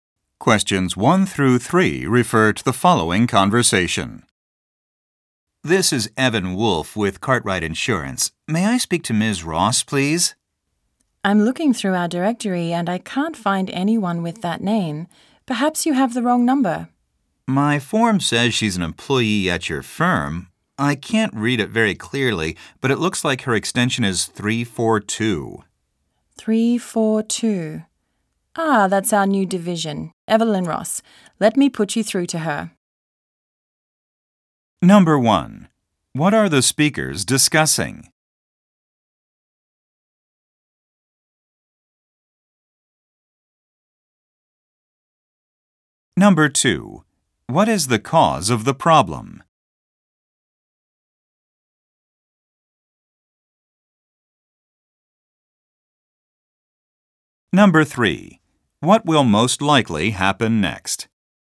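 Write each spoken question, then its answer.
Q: What are the speakers discussing?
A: Reaching Ms. Ross, an employee at the firm, by phone

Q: What will most likely happen next?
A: The call will be put through to Evelyn Ross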